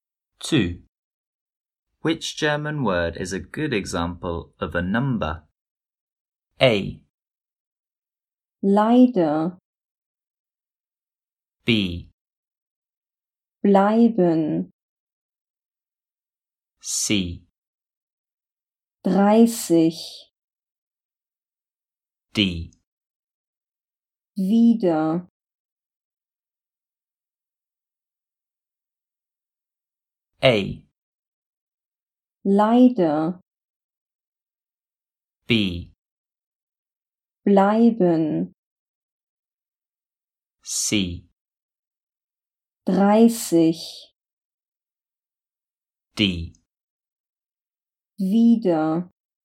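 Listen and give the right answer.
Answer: C: 30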